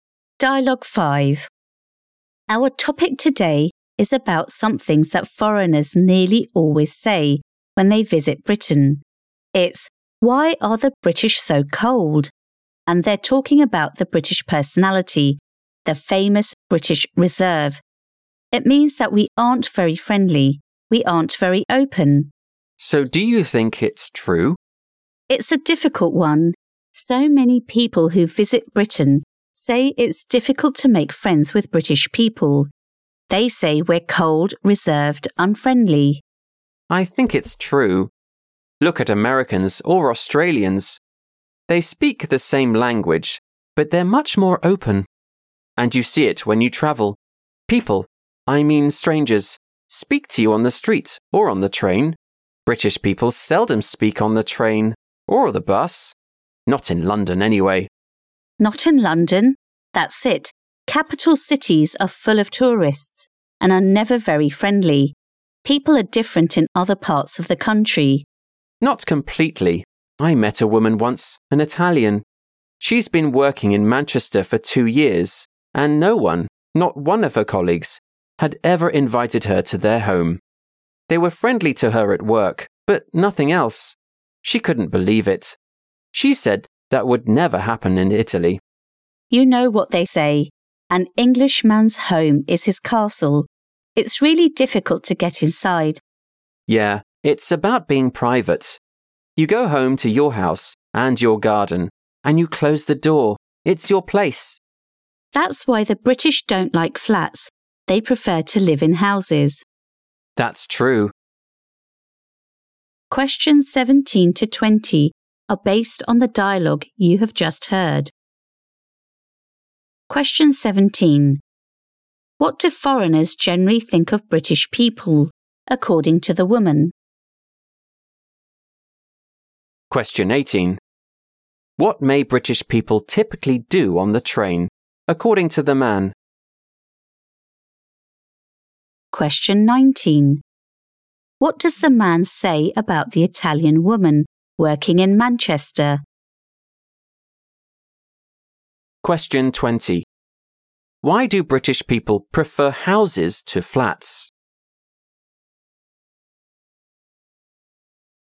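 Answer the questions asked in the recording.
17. They are cold, reserved and unfriendly.
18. They seldom speak to others.
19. None of her colleagues ever invited her to their home.
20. They value privacy; a house is their own private place.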